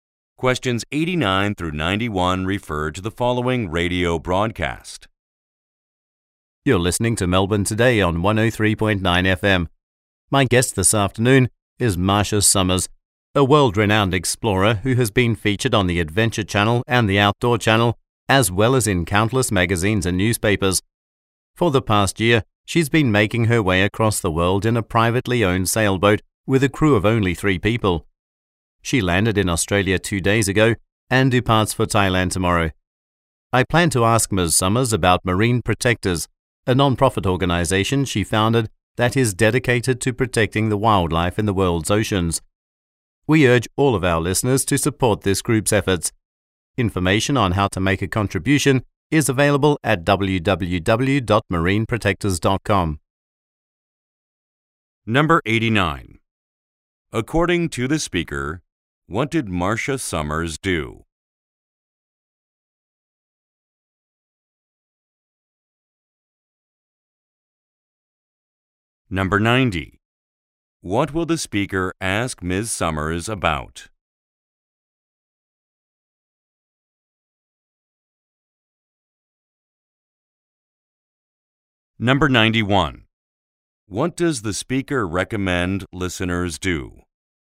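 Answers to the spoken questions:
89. Sailed across the world in a private sailboat with a crew of three
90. Marine Protectors, the non-profit organization she founded
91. Support Marine Protectors by making a contribution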